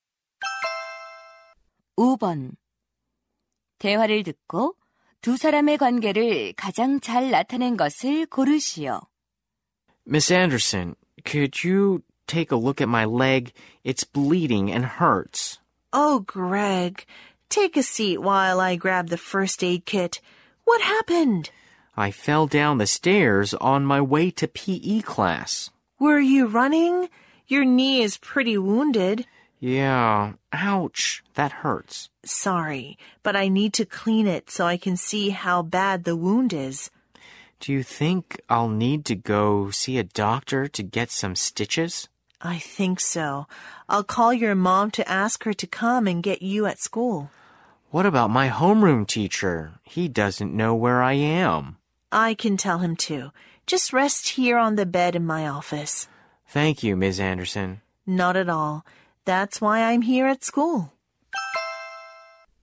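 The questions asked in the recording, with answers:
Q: 대화를 듣고 두 사람의 관계를 가장 잘 나타낸 것을 고르시오.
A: 보건 교사 - 학생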